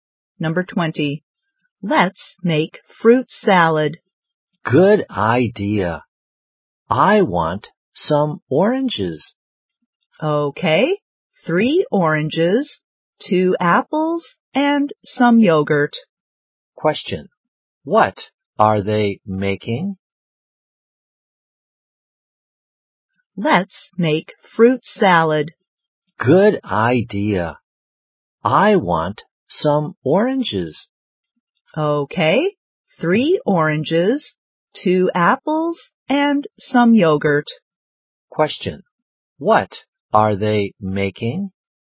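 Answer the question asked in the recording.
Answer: Fruit salad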